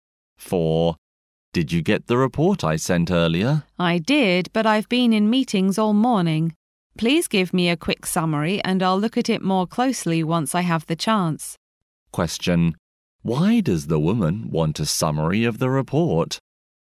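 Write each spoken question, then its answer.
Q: Why does the woman want a summary of the report?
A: She has been busy in meetings and has no time to read it yet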